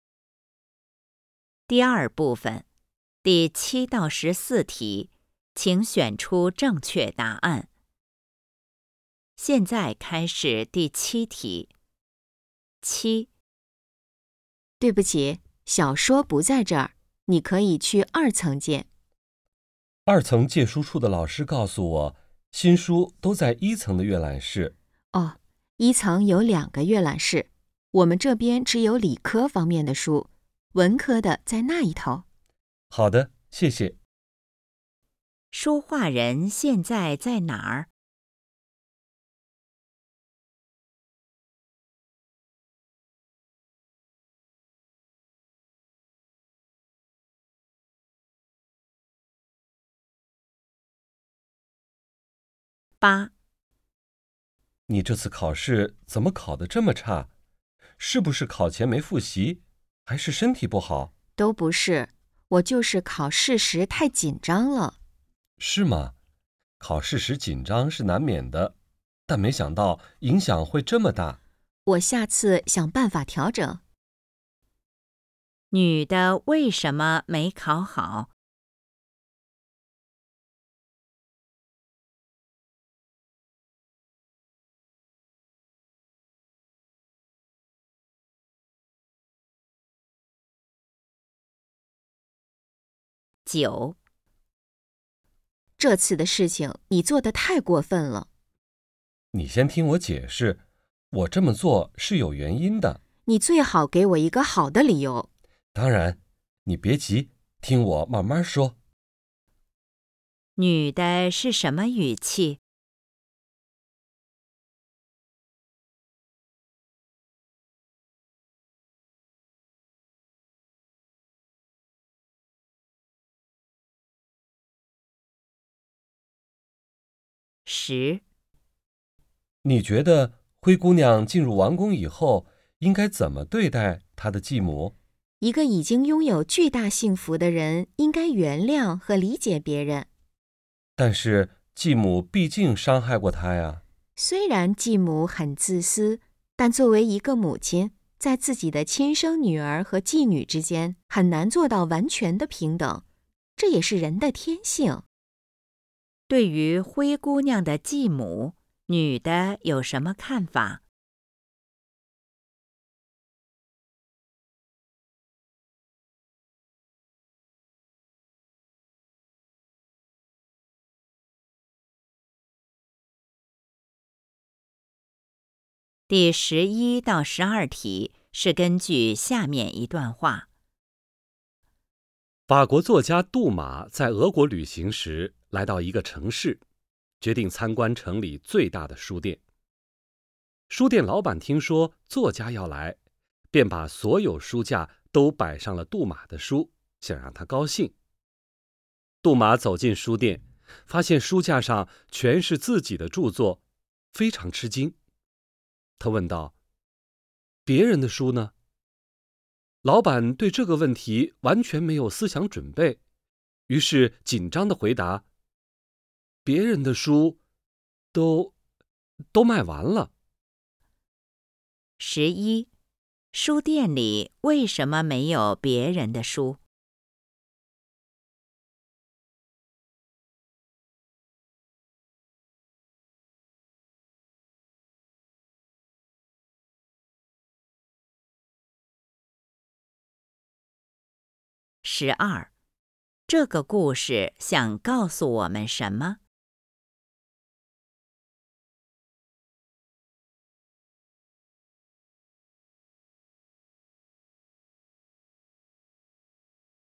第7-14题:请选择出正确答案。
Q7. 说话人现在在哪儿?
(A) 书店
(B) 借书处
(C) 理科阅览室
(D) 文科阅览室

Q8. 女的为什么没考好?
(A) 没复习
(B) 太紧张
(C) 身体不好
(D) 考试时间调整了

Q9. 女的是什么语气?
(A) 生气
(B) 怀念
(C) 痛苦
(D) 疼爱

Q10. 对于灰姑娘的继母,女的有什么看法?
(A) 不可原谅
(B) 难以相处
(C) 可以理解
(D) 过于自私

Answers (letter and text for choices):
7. (C) 理科阅览室
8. (B) 太紧张
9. (A) 生气
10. (C) 可以理解

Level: HSK 5